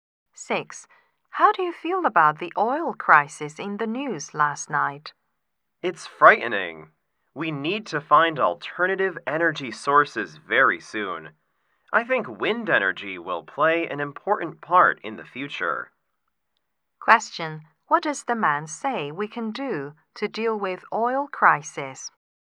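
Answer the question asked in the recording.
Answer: Use alternative energy such as wind energy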